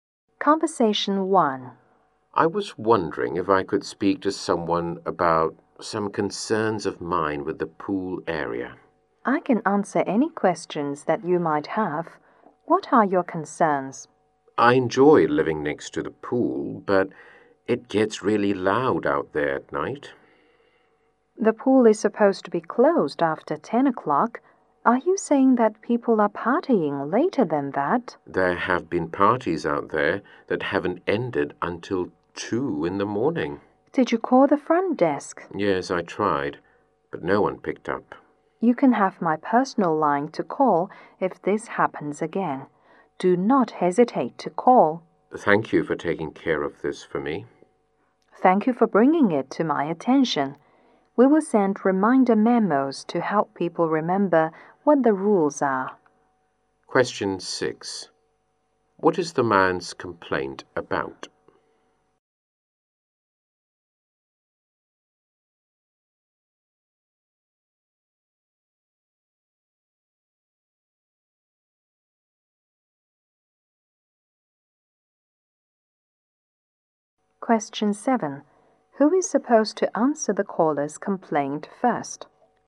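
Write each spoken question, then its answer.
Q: What is the man's complaint about?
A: Loud pool parties late at night

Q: Who is supposed to answer the caller's complaint first?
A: The front desk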